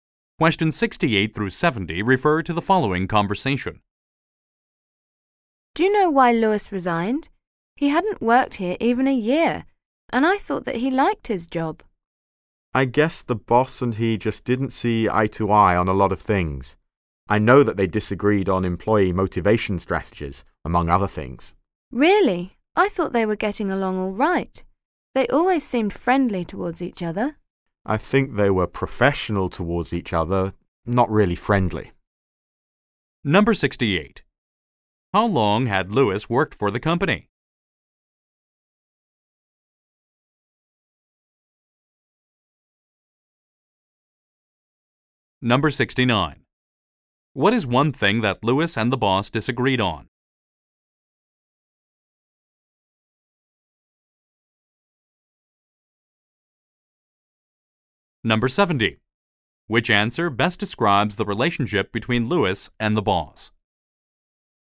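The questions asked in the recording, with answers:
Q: How long had Lewis worked for the company?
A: Less than a year

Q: What is one thing that Lewis and the boss disagreed on?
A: Employee motivation strategies

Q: Which answer best describes the relationship between Lewis and the boss?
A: Professional but not really friendly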